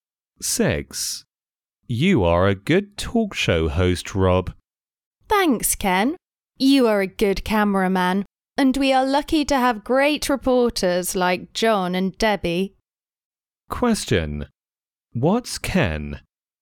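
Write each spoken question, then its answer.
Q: What's Ken?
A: A cameraman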